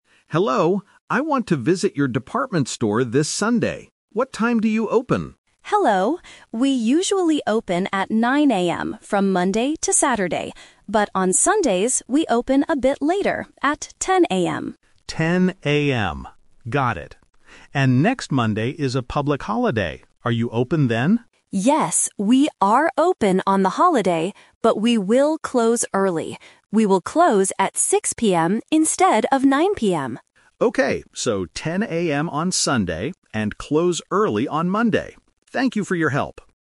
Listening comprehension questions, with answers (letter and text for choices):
Listen to the telephone conversation and choose the correct answer (A, B, or C) for each question.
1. What time does the department store open on Sundays?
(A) At 9:00 AM.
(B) At 10:00 AM.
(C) At 6:00 PM.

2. What is happening next Monday?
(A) The store is closed all day.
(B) There is a big weekend sale.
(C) It is a public holiday.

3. What time does the store close on the public holiday?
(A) At 6:00 PM.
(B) At 9:00 AM.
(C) At 9:00 PM.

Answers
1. (B) At 10:00 AM.
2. (C) It is a public holiday.
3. (A) At 6:00 PM.

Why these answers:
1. The operator says, "But on Sundays, we open a bit later, at 10:00 AM." Why the trap is wrong: Option (A) is the trap. 9:00 AM is the opening time for normal days (Monday to Saturday), not Sunday. Option (C) is a closing time mentioned later.
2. The customer asks, "And next Monday is a public holiday. Are you open then?" Why the trap is wrong: Option (A) is a trap because many places close on holidays, but the operator says "Yes, we are open." Option (B) is plausible for a department store but is never mentioned.
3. This is "The Twist". The operator explains the holiday hours: "we will close early. We will close at 6:00 PM..." Why the trap is wrong: Option (C) is the trap. 9:00 PM is the normal closing time ("instead of 9:00 PM"). Option (B) is the normal morning opening time.